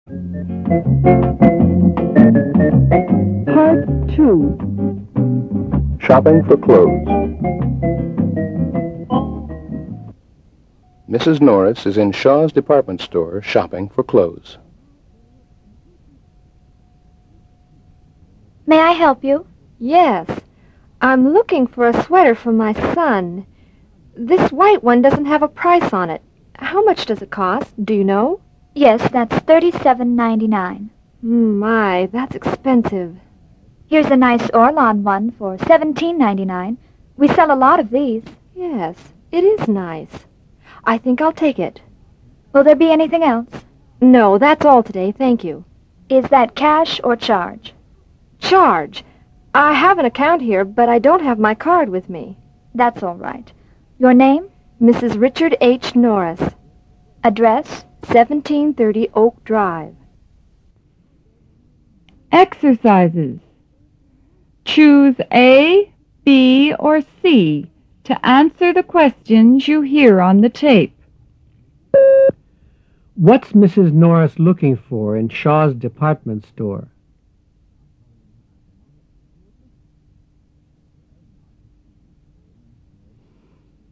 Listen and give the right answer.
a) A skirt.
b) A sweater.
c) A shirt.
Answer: b) A sweater.